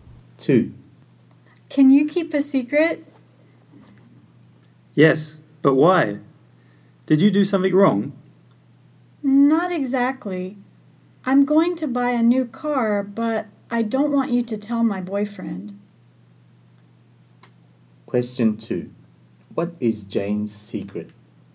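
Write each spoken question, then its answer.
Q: What is Jane's secret?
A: She is going to buy a new car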